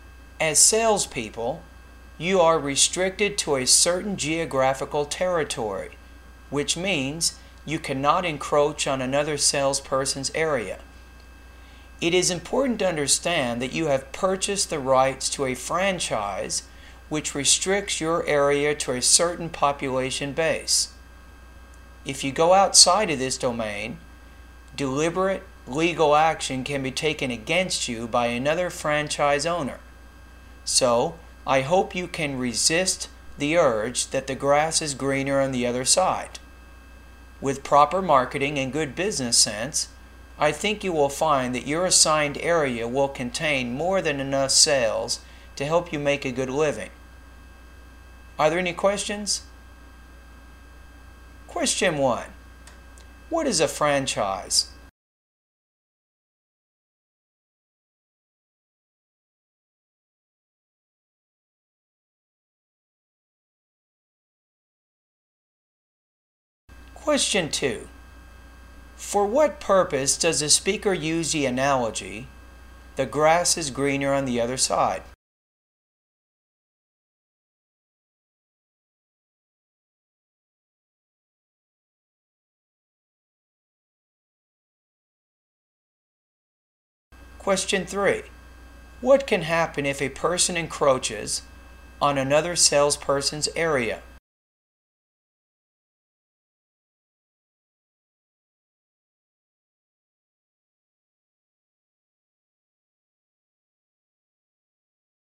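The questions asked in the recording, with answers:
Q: What can happen if a person encroaches on another salesperson's area?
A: Another franchise owner can take legal action against them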